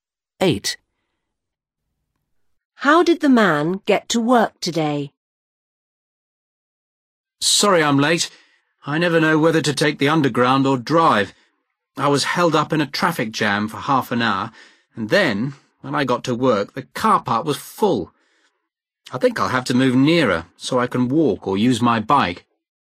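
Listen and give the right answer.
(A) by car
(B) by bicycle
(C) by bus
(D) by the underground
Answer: (A) by car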